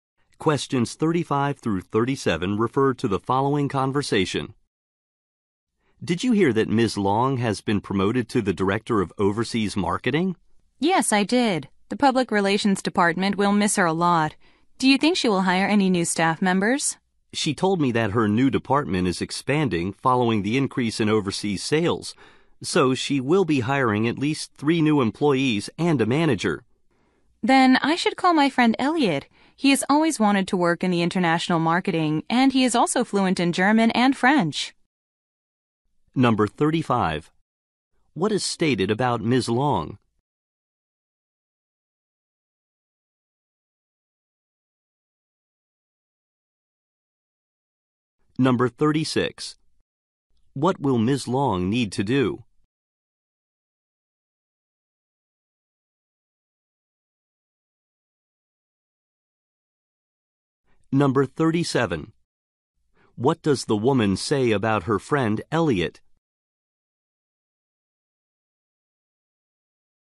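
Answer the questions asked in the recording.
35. She was promoted to Director of Overseas Marketing
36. Hire new staff
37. He wants to work in international marketing and speaks German and French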